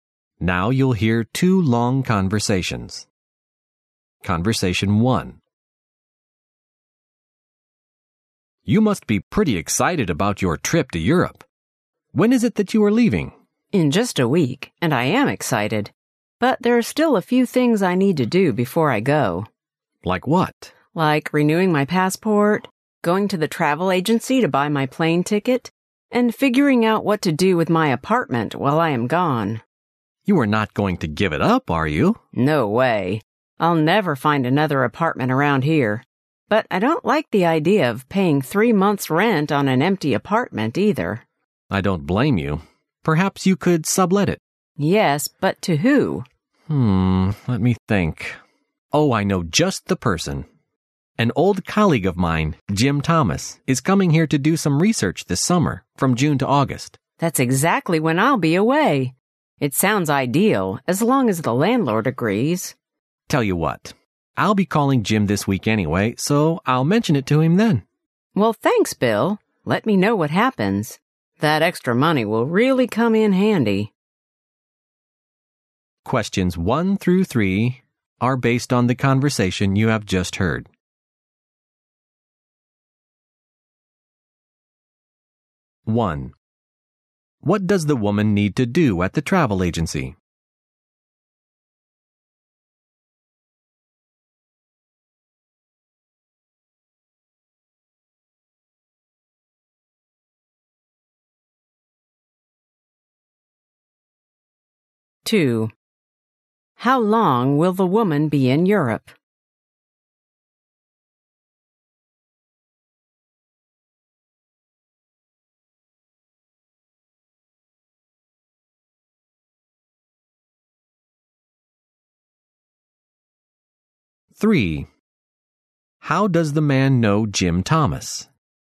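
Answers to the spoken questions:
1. Buy her plane ticket
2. Three months
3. They used to be colleagues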